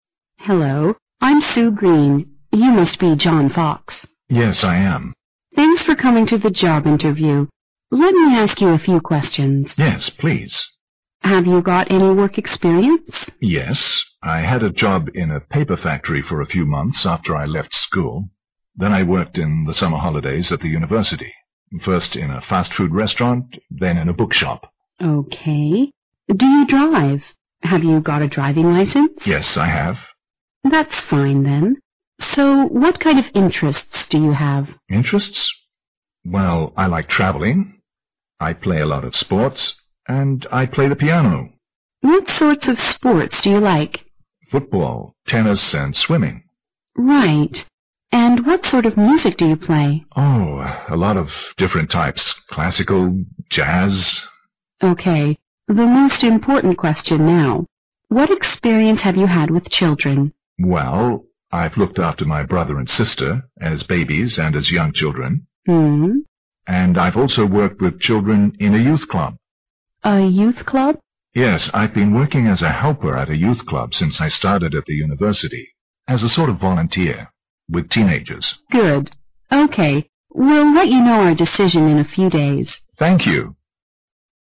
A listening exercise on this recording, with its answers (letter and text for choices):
Questions 18 to 20 are based on the following conversation. At the end of the conversation, you will be given 20 seconds to answer the questions. Now listen to the conversation.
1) John has worked in all the following places EXCEPT ______.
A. a book shop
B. a paper factory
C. a school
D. a fastfood restaurant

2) From the conversation, we learn that John ______.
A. has no interest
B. has only one interest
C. has two interests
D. has quite a few interests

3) Sue Green seems to be more interested in John's experience of ______.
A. working in a paper factory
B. working in a youth club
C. looking after his brother and sister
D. looking after his young friends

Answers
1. C. a school
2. D. has quite a few interests
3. B. working in a youth club